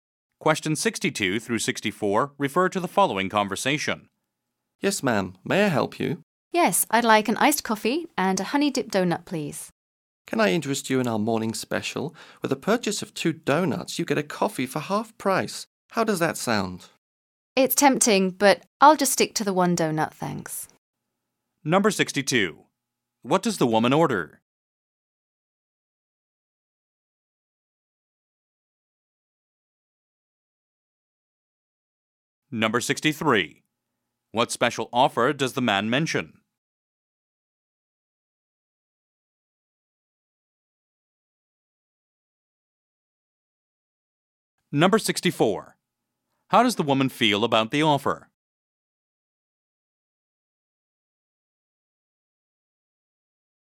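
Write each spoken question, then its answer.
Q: What does the woman order?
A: An iced coffee and a honey-dipped donut

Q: What special offer does the man mention?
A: Half-price coffee with two donuts

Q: How does the woman feel about the offer?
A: Tempted but declines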